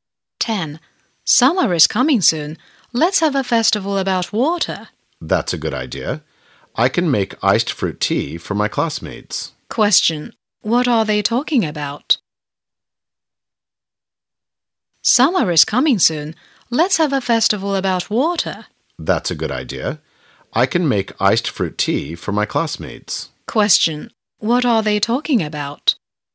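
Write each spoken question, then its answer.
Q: What are they talking about?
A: Having a water festival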